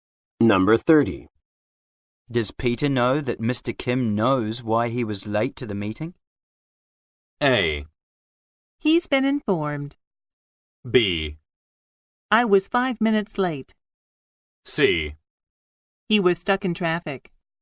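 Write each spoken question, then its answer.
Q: Does Peter know that Mr. Kim knows why he was late to the meeting?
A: A: He's been informed.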